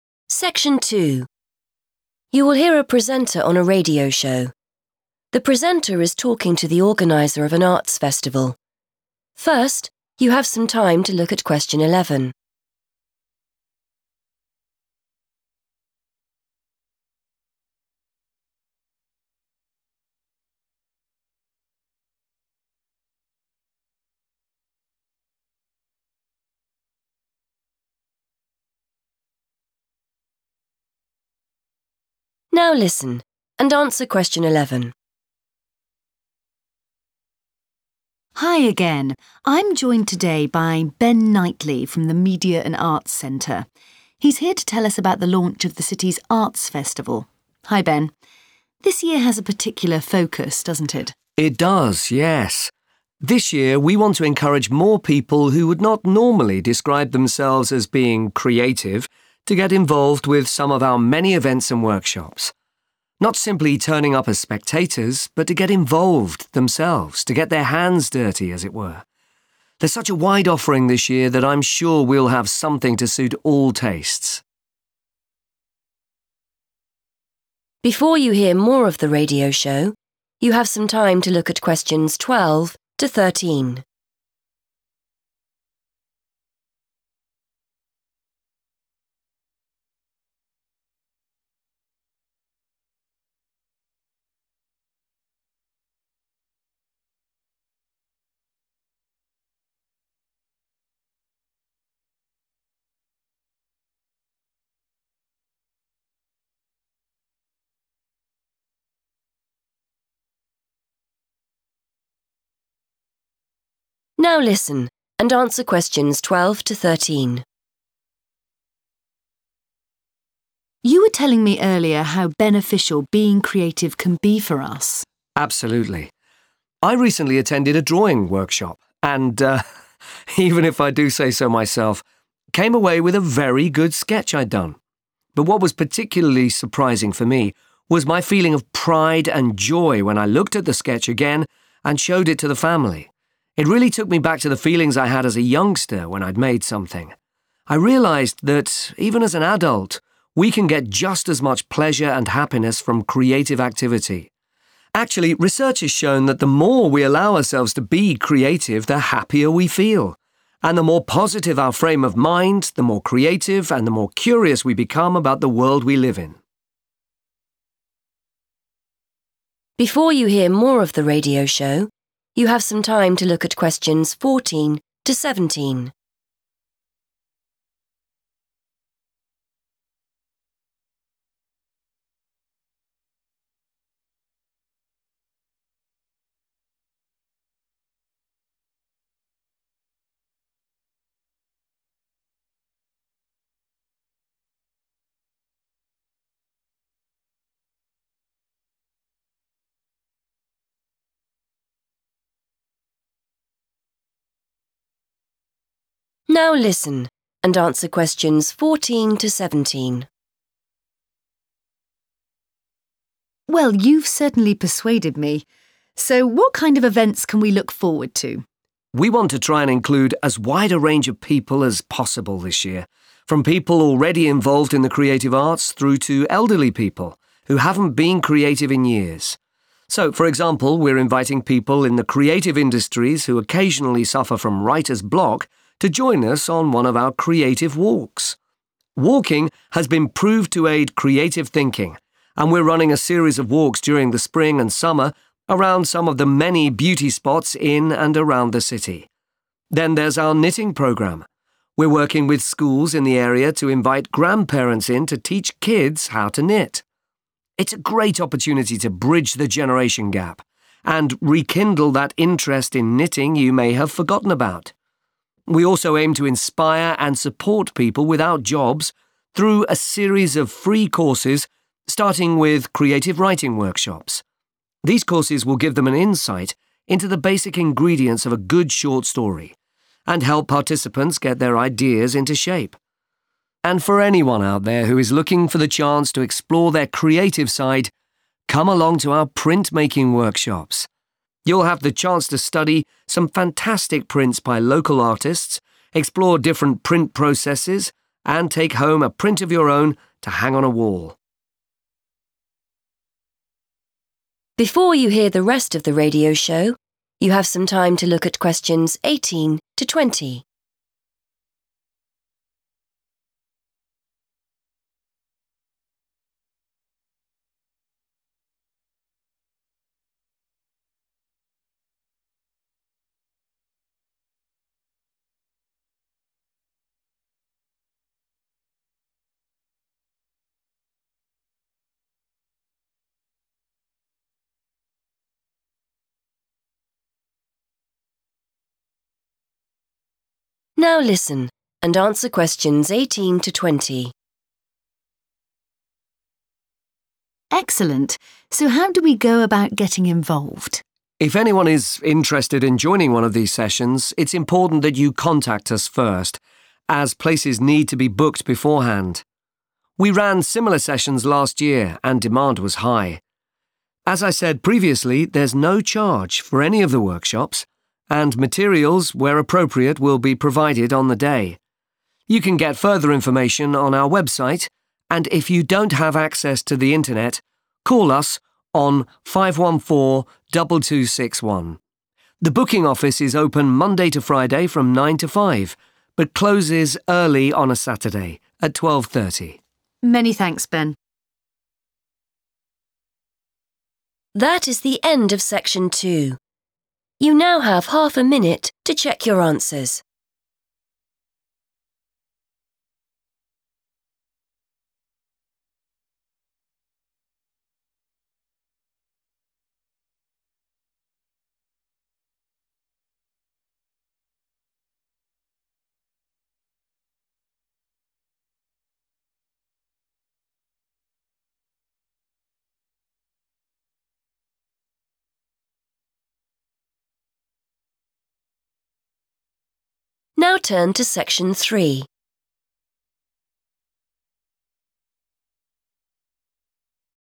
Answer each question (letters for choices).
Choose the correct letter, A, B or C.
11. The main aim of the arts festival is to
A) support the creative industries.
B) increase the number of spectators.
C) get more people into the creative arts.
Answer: C

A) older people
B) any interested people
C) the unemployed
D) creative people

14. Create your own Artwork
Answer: B

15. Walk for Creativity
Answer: D

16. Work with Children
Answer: A

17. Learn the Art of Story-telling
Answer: C

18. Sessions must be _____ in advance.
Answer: booked

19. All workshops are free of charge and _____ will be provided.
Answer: materials

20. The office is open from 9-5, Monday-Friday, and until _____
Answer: 12.30 / 12:30 / twelve thirty

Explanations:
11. The correct answer is C because Ben says the festival wants people who do not usually think they are creative to take part in the workshops. He explains that they do not want people just to watch; they want them to join in and do things themselves. This matches the idea of getting more people into the creative arts. He uses words like 'encourage' and 'get involved' to show this goal.
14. The correct answer is B because the speaker, Ben, mentions printmaking workshops and specifically invites "anyone" who wants to "explore their creative side." He explains that participants in these workshops will "take home a print of your own," which is the same as creating your own artwork. This shows that the activity is not limited to a specific group like elderly people or those without jobs. The use of "anyone" matches the choice "any interested people."
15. The correct answer is D because the speaker specifically mentions that 'people in the creative industries' are invited to join the 'creative walks.' This group refers to individuals who are already involved in creative tasks as part of their work. The walks are designed to help these creative people when they have 'writer's block' or difficulty thinking of new ideas.
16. The correct answer is A because the transcript mentions a knitting program where schools invite 'grandparents' to teach 'kids.' In this context, grandparents are individuals belonging to the 'older people' group, and kids are 'children.' This activity is specifically designed to bring these two different age groups together.
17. The correct answer is C because the speaker specifically mentions that 'people without jobs' (another way to say 'the unemployed') will be offered 'creative writing workshops.' These workshops help them learn the 'ingredients of a good short story,' which is what 'the art of story-telling' refers to.
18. The correct answer is 'booked' because Ben explains that anyone joining a session must contact the office first. He says 'places need to be booked beforehand'. The word 'beforehand' is a synonym for 'in advance', which is the phrase used in the question.
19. The correct answer is "materials" because Ben mentions that there is "no charge" (which means free) for the workshops and that "materials" will be "provided" (which means given) to the students. This confirms that these items are supplied by the organizers.
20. The correct answer is correct because Ben mentions the specific operating hours for the booking office at the end of the talk. He notes that while the office is open until five o'clock on weekdays, it shuts earlier at twelve thirty on Saturdays.

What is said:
Presenter: Hi again. I'm joined today by Ben Knightly from the Media and Arts Centre. He's here to tell us about the launch of the city's arts festival. Hi Ben. This year has a particular focus, doesn't it?
Ben: It does, yes. This year we want to encourage more people who would not normally describe themselves as being creative to get involved with some of our many events and workshops. Not simply turning up as spectators but to get involved themselves, to get their hands dirty as it were. There's such a wide offering this year that I'm sure we'll have something to suit all tastes.
Presenter: You were telling me earlier how beneficial being creative can be for us.
Ben: Absolutely. I recently attended a drawing workshop, and even if I do say so myself, came away with a very good sketch I'd done. But what was particularly surprising for me was my feeling of pride and joy when I looked at the sketch again and showed it to the family. It really took me back to the feelings I had as a youngster when I'd made something. I realised that even as an adult we can get just as much pleasure and happiness from creative activity. Actually, research has shown that the more we allow ourselves to be creative, the happier we feel; and the more positive our frame of mind, the more creative and the more curious we become about the world we live in.
Presenter: Well, you've certainly persuaded me. So, what kind of events can we look forward to?
Ben: We want to try and include as wide a range of people as possible this year, from people already involved in the creative arts through to elderly people who haven't been creative in years. So for example, we're inviting people in the creative industries who occasionally suffer from writer's block to join us on one of our creative walks. Walking has been proved to aid creative thinking and we're running a series of walks during the spring and summer around some of the many beauty spots in and around the city. Then there's our knitting programme. We're working with schools in the area to invite grandparents in to teach kids how to knit. It's a great opportunity to bridge the generation gap and rekindle that interest in knitting you may have forgotten about. We also aim to inspire and support people without jobs through a series of free courses starting with creative writing workshops. These courses will give them an insight into the basic ingredients of a good short story and help participants get their ideas into shape. And for anyone out there who is looking for the chance to explore their creative side, come along to our printmaking workshops. You'll have the chance to study some fantastic prints by local artists, explore different print processes, and take home a print of your own to hang on a wall.
Presenter: Excellent. So how do we go about getting involved?
Ben: If anyone is interested in joining one of these sessions, it's important that you contact us first as places need to be booked beforehand. We ran similar sessions last year and demand was high. As I said previously, there's no charge for any of the workshops, and materials where appropriate will be provided on the day. You can get further information on our website and if you don't have access to the internet, call us on 514 2261. The booking office is open Monday to Friday from nine to five, but closes early on a Saturday at 12.30.
Presenter: Many thanks, Ben.